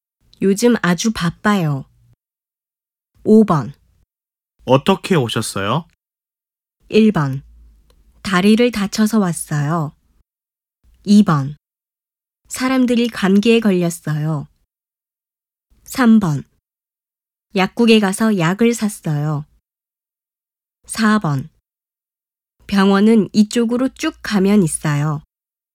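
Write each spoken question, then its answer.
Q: 어떻게 오셨어요?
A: 1: 다리를 다쳐서 왔어요.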